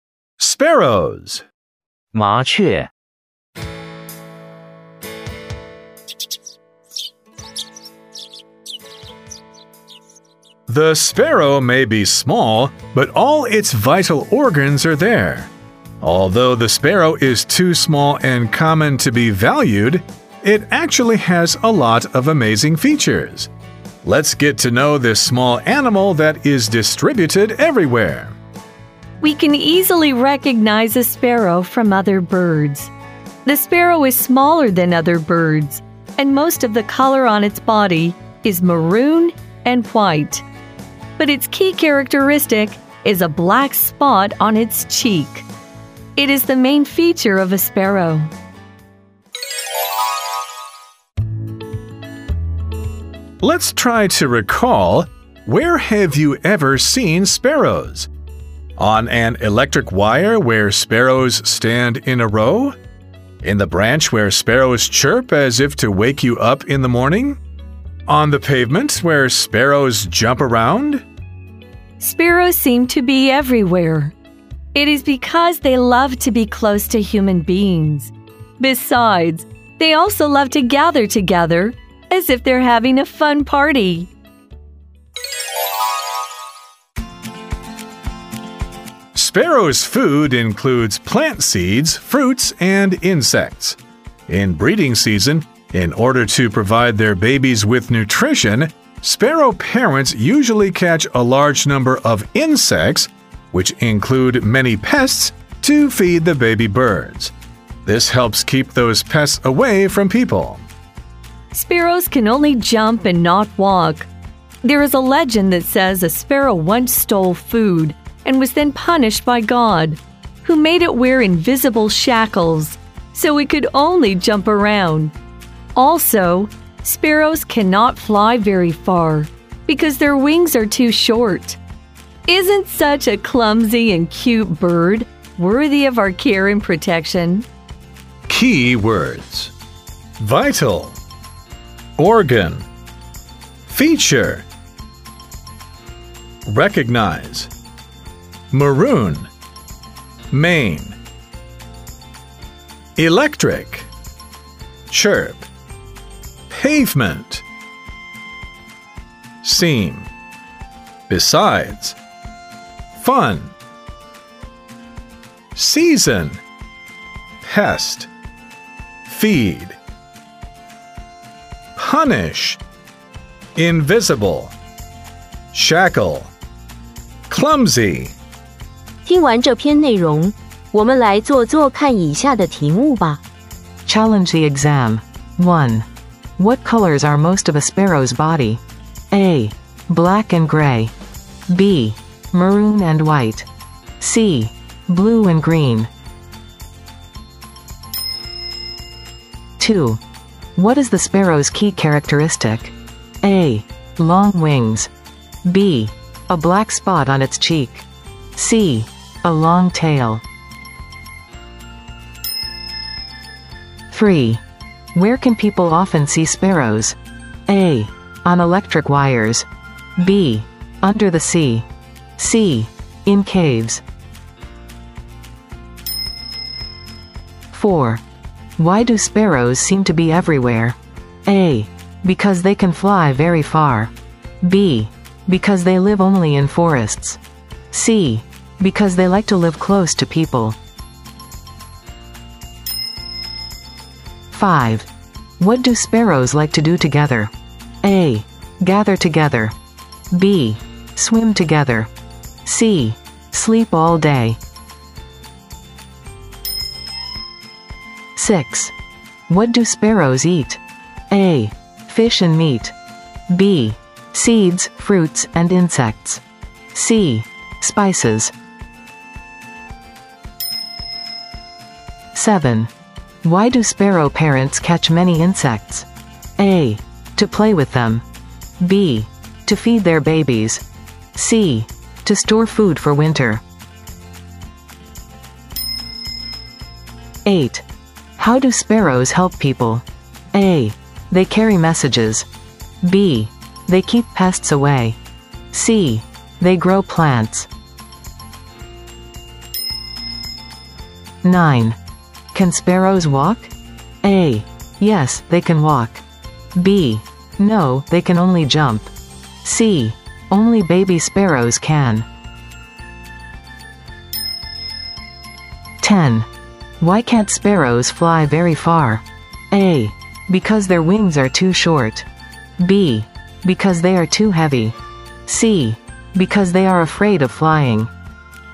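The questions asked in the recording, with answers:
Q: What colors are most of a sparrow's body?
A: B: Maroon and white.

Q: What is the sparrow's key characteristic?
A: B: A black spot on its cheek.

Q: Where can people often see sparrows?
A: A: On electric wires.

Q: Why do sparrows seem to be everywhere?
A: C: Because they like to live close to people.

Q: What do sparrows like to do together?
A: A: Gather together.

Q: What do sparrows eat?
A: B: Seeds, fruits, and insects.

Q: Why do sparrow parents catch many insects?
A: B: To feed their babies.

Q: How do sparrows help people?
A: B: They keep pests away.

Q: Can sparrows walk?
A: B: No, they can only jump.

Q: Why can't sparrows fly very far?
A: A: Because their wings are too short.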